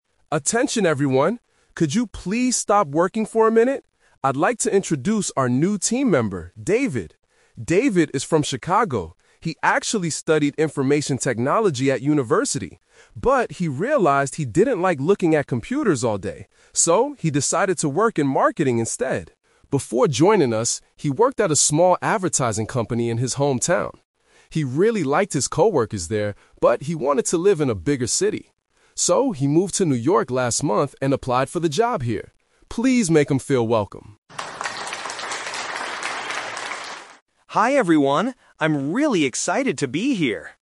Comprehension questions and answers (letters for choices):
Listen to a manager introducing a new employee to the team. For each question, choose the correct answer (A, B, or C).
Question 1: What did David study at university?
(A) Marketing.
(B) Information Technology.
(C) Advertising.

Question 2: Why did David choose to work in marketing?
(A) Because he didn't like working with computers all day.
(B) Because he wanted to earn more money.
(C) Because marketing was his favorite subject at school.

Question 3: Why did David leave his old job?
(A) He didn't like his coworkers.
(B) He wanted to live in a larger city.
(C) The company closed down.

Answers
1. B
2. A
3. B

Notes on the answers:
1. The manager clearly says, "He actually studied Information Technology at university." Why the traps are wrong: Option A is a "Twist Trap". He works in marketing now, but he didn't study it. Option C is the type of company he worked for later.
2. Options B and C are plausible reasons for someone to choose a career, but they are not mentioned in the audio.
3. The manager says, "...but he wanted to live in a bigger city. So, he moved to New York..." Why the traps are wrong: Option A is a direct trap. The audio states the exact opposite: "He really liked his coworkers there." Option C is not mentioned.

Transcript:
Could you please stop working for a minute? I'd like to introduce our new team member, David. David is from Chicago. He actually studied Information Technology at university. But he realized he didn't like looking at computers all day. So, he decided to work in marketing instead.
Before joining us, he worked at a small advertising company in his hometown. He really liked his coworkers there, but he wanted to live in a bigger city. So, he moved to New York last month and applied for the job here. Please make him feel welcome!
David: Hi everyone! I'm really excited to be here.